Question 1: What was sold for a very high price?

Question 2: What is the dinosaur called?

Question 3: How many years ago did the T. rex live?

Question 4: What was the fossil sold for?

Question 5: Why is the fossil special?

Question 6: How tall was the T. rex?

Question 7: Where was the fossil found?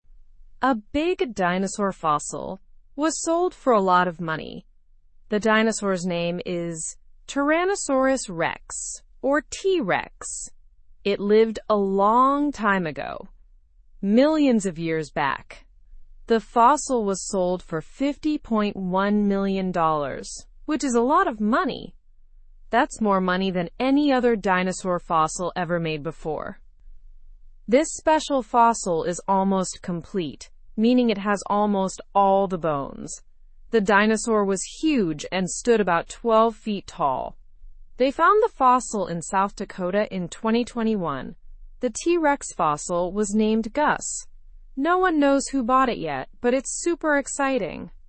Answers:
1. The dinosaur fossil was sold for a high price.
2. The dinosaur is called Tyrannosaurus rex, or T. rex.
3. The T. rex lived millions of years ago.
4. The fossil was sold for $50.1 million.
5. The fossil is special because it is almost complete.
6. The T. rex was about 12 feet tall.
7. The fossil was found in South Dakota in 2021.

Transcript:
A big dinosaur fossil was sold for a lot of money. The dinosaur's name is Tyrannosaurus rex, or T. rex. It lived a long time ago, millions of years back. The fossil was sold for $50.1 million, which is a lot of money! That's more money than any other dinosaur fossil ever made before.
This special fossil is almost complete, meaning it has almost all the bones. The dinosaur was huge and stood about 12 feet tall. They found the fossil in South Dakota in 2021. The T. rex fossil was named Gus. No one knows who bought it yet, but it's super exciting!

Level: (Level 1)